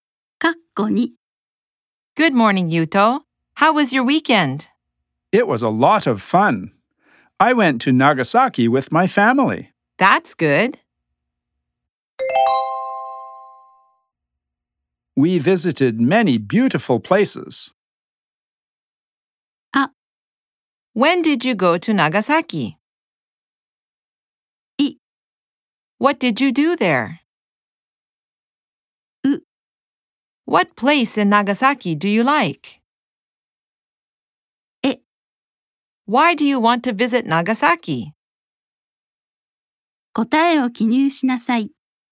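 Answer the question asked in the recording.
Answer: B: What did you do there?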